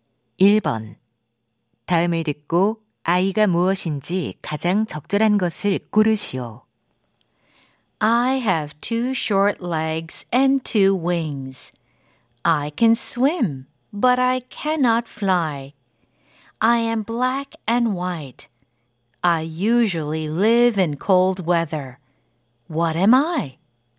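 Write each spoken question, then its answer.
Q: 다음을 듣고 아이가 무엇인지 가장 적절한 것을 고르시오.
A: 펭귄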